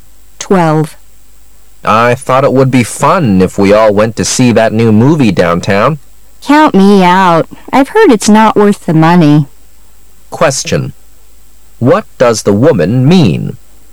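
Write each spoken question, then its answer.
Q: What does the woman mean?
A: She doesn't want to go to the movie

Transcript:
[解析] M: I thought it would be fun if we all went to see that new movie downtown. W: Count me out. I've heard it's not worth the money. Q: What does the woman mean?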